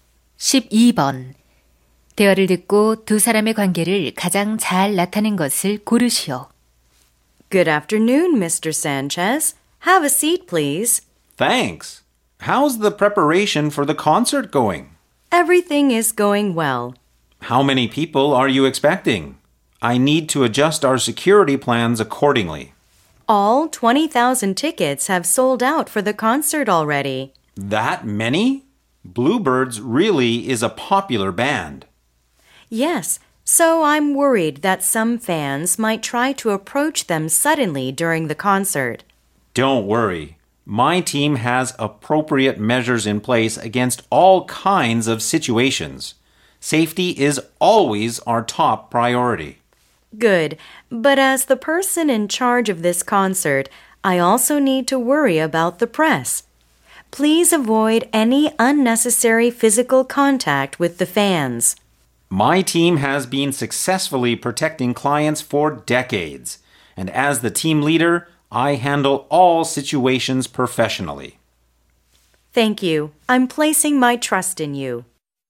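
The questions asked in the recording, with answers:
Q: 대화를 듣고 두 사람의 관계를 가장 잘 나타낸 것을 고르시오.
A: 콘서트 책임자 – 경호팀장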